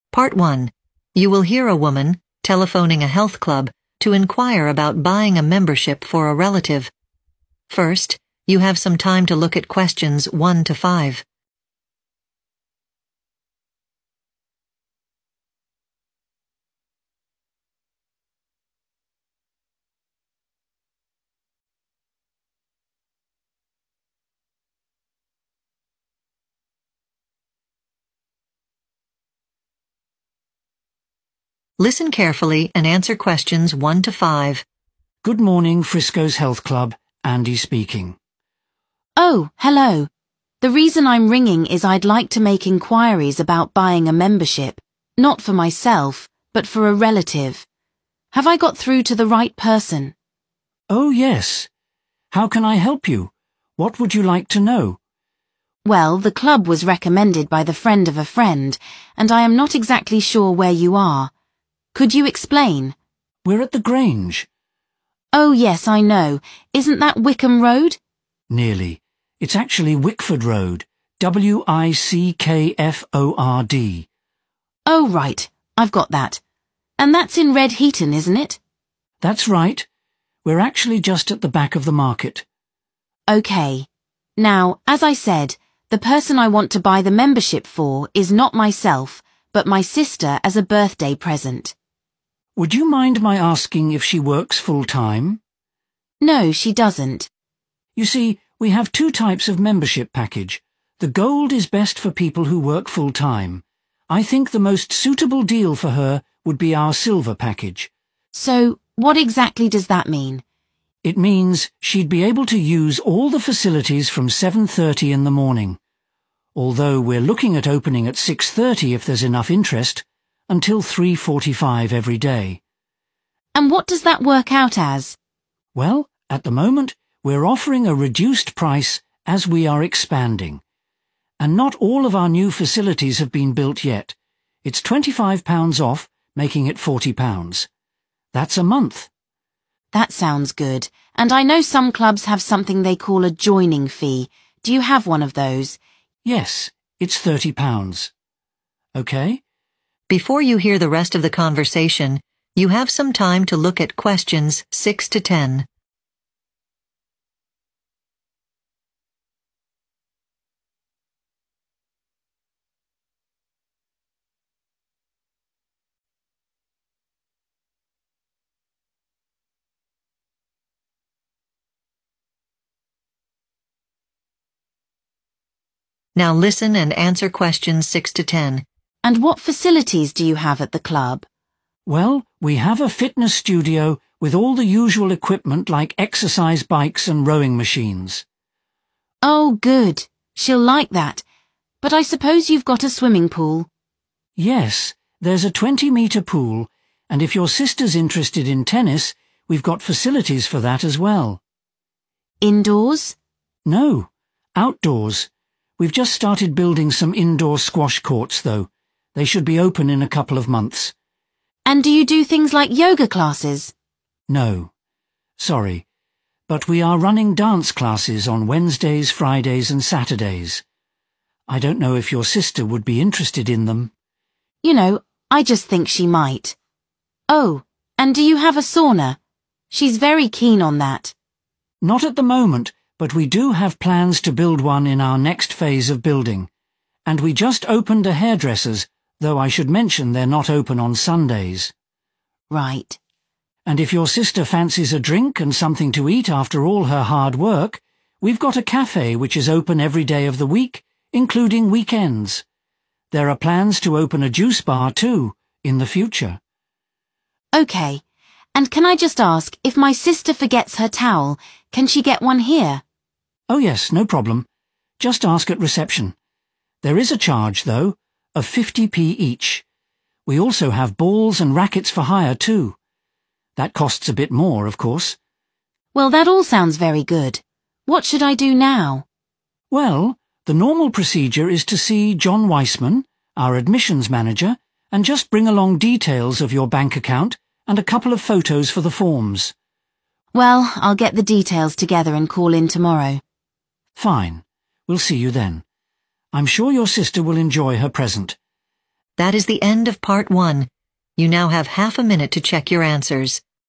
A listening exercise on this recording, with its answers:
Complete the notes below. Write NO MORE THAN TWO WORDS AND/OR A NUMBER for each answer.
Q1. Address: 1....................Road, Red Heaton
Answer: Wickford

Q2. Recommended type of membership package: 2....................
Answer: silver

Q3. Facilities opening time: 3.................... to 3.45 p.m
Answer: 7.30 a.m.

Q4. Cost with discount: 4 $....................per month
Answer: 40

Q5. .................... is $30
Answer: joining fee

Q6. ....................courts (outdoor only)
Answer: tennis

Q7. ....................classes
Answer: dance

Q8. a 8....................is open every day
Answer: cafe

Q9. Can rent a 9....................at the reception (charge a small fee of 50)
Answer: towel

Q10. Need to bring details of a bank account and two 10....................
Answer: photos